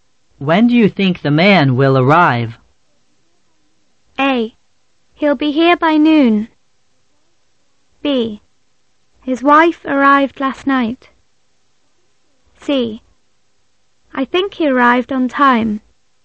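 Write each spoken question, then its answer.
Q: When do you think the man will arrive?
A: A: He'll be here by noon.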